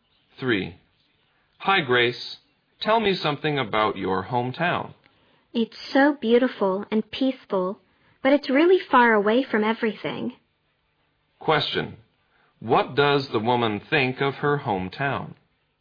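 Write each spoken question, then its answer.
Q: Question. What does the woman think of her hometown?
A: It is beautiful and peaceful but far away from everything.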